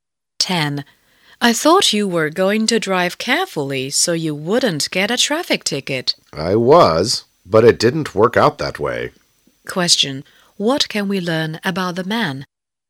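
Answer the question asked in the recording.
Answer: He got a traffic ticket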